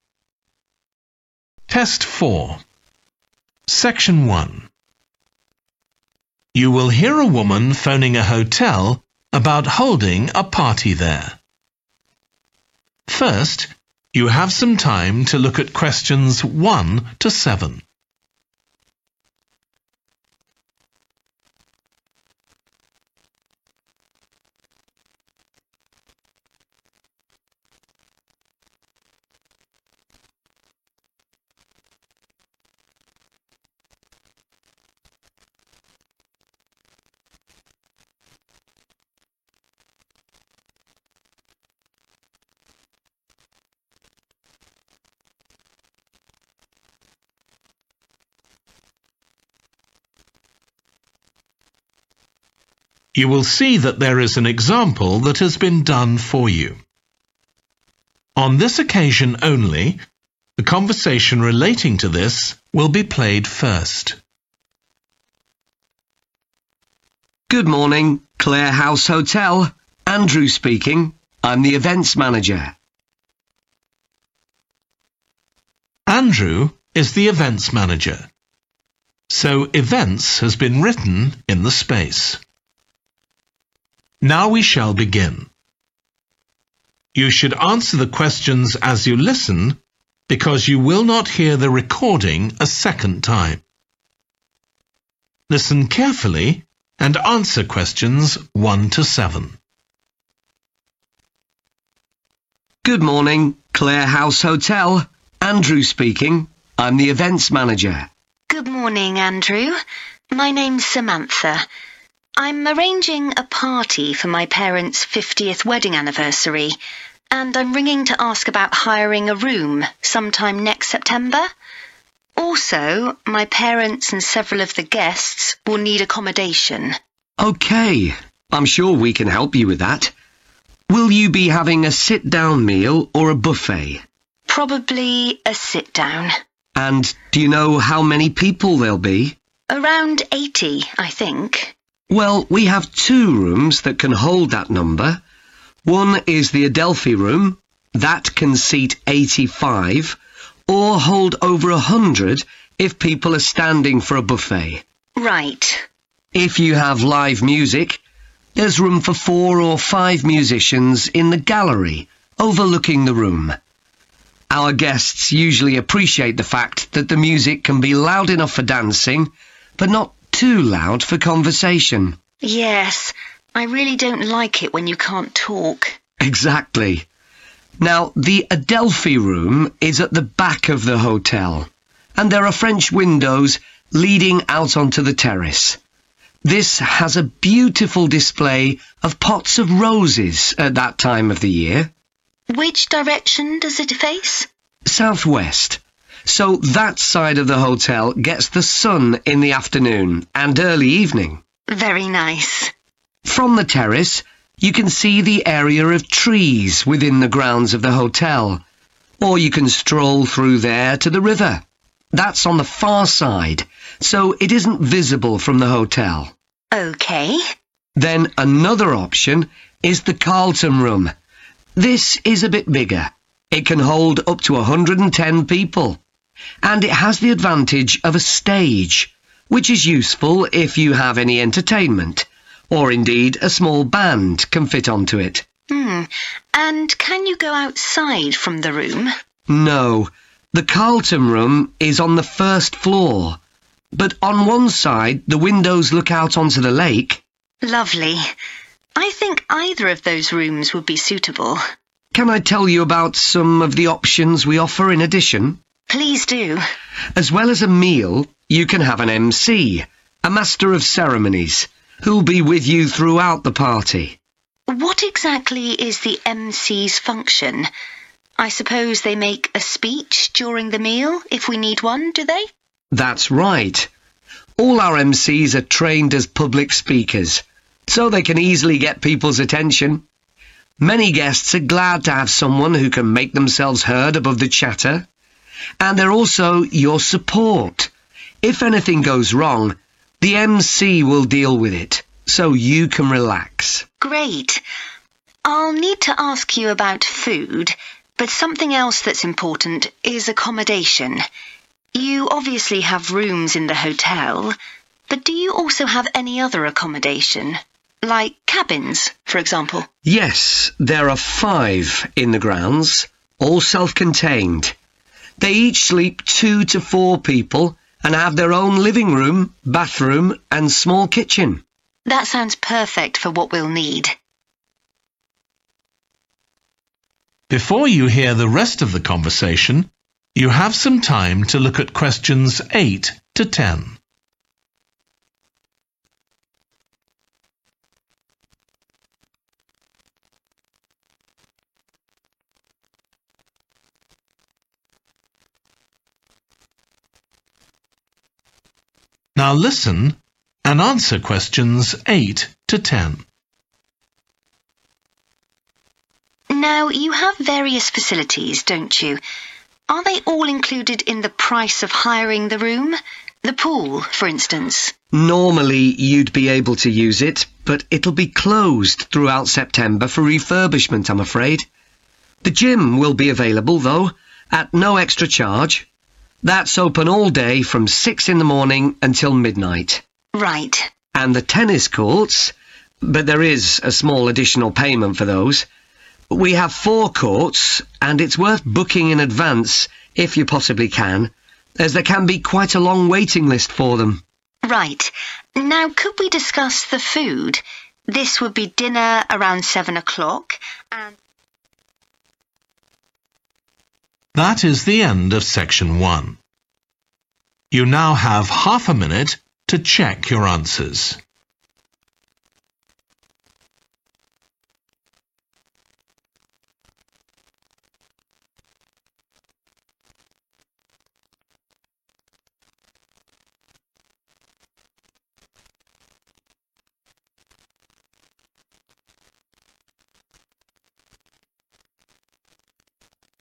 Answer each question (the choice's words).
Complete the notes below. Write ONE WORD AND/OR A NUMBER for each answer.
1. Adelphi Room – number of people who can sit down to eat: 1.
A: 85

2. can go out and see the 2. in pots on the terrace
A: roses

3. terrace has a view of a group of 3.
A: trees

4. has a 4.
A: stage

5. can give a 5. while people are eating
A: speech

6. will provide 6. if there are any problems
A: support

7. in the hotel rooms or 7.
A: cabins

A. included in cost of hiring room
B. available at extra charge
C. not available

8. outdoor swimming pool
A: not available

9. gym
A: included in cost of hiring room

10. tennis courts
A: available at extra charge